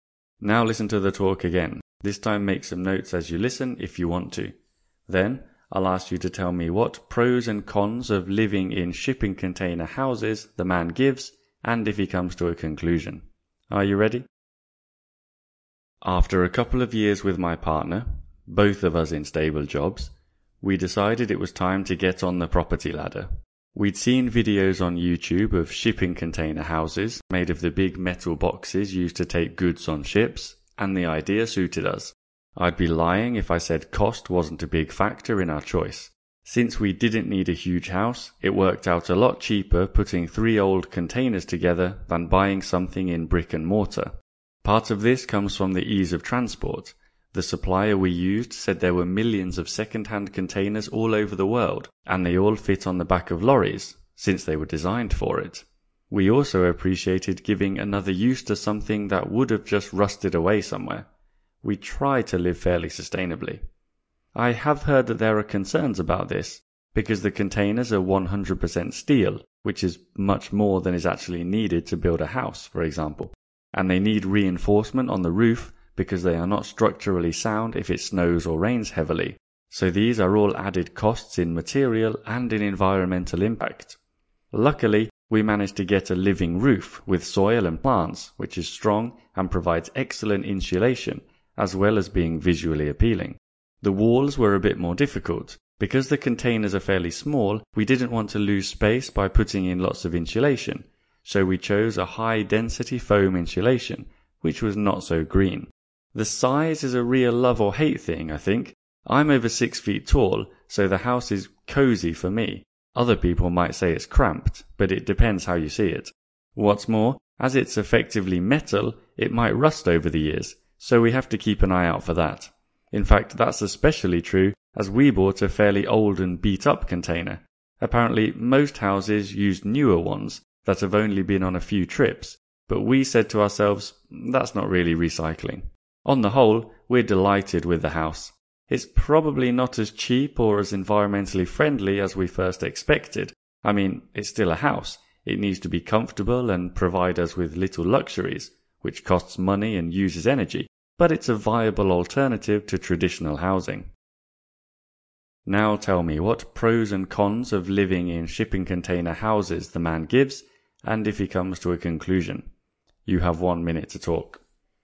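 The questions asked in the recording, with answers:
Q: Now tell me, what pros and cons of living in shipping container houses the man gives, and if he comes to a conclusion.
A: Pros: cheaper, easy to transport, reuses old containers, living roof gives insulation. Cons: too much steel, roof needs reinforcement, insulation not green, small space, rust. Conclusion: delighted; not as cheap or green as expected but a viable alternative to traditional housing.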